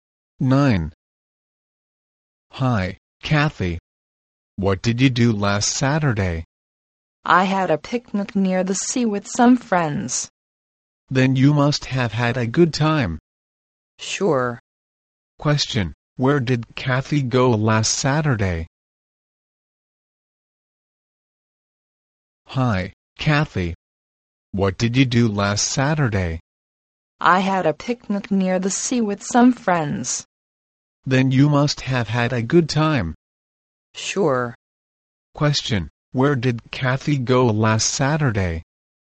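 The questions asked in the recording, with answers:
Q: Where did Kathy go last Saturday?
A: Near the sea, for a picnic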